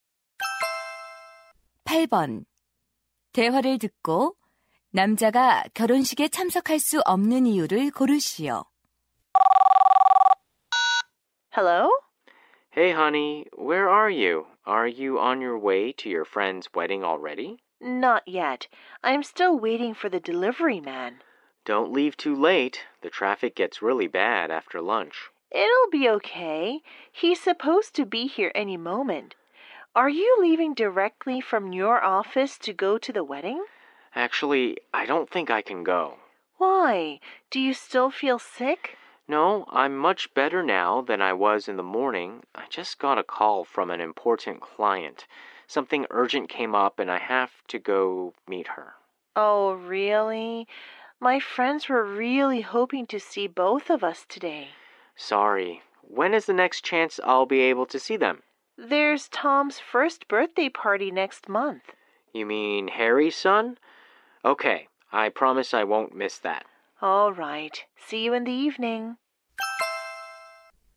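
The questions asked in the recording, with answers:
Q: 대화를 듣고 남자가 결혼식에 참석할 수 없는 이유를 고르시오.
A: 중요한 고객을 급히 만나야 해서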